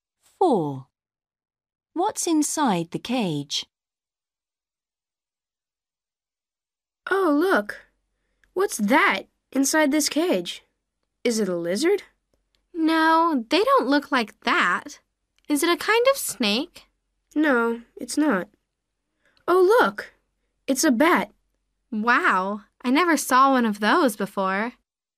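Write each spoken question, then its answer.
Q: What's inside the cage?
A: A bat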